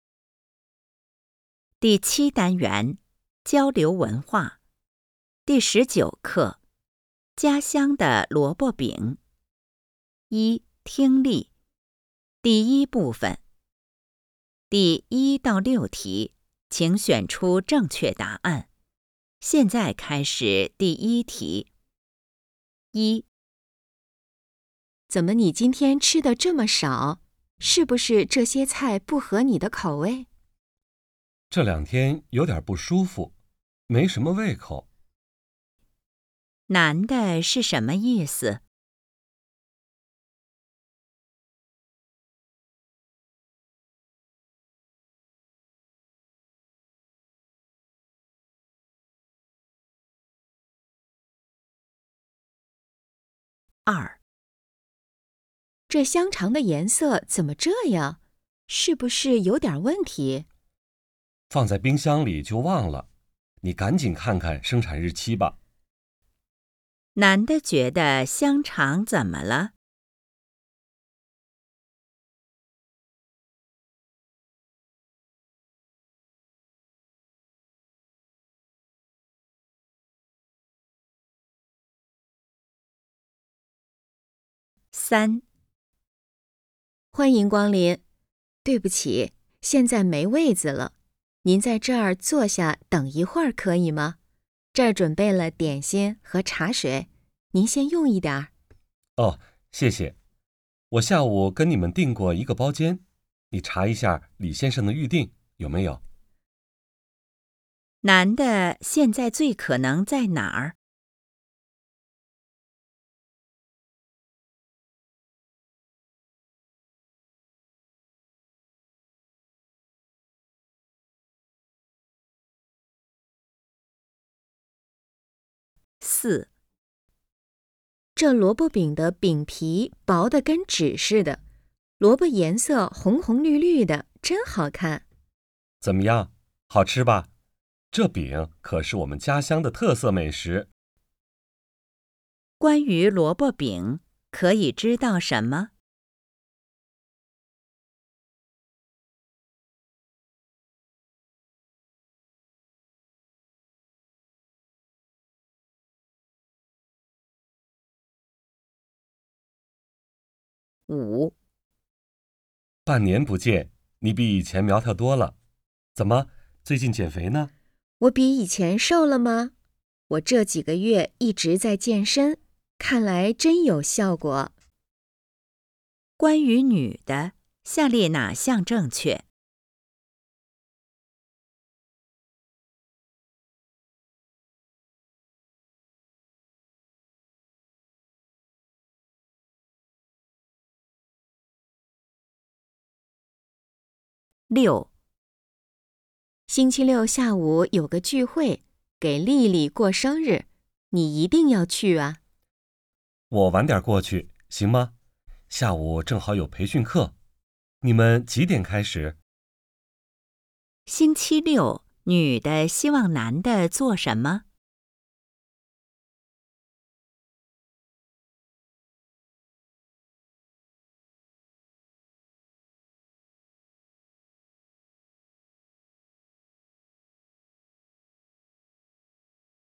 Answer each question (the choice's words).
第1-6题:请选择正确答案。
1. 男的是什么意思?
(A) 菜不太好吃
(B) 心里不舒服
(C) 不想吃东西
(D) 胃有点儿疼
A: 不想吃东西

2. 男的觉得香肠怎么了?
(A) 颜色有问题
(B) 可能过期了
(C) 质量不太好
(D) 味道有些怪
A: 可能过期了

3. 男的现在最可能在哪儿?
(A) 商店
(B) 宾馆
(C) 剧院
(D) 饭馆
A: 饭馆

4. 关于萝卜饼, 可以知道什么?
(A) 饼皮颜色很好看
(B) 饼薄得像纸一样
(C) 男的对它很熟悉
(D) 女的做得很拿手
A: 饼薄得像纸一样

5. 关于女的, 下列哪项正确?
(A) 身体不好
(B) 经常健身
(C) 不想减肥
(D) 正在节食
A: 经常健身

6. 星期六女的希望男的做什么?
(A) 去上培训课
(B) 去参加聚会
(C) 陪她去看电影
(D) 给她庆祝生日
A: 去参加聚会

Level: HSK 5